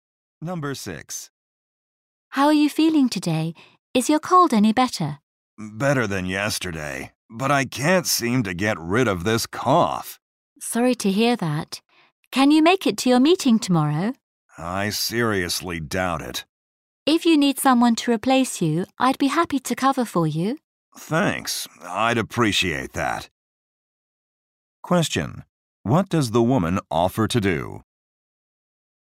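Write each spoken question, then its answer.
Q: What does the woman offer to do?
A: Cover for the man at his meeting tomorrow.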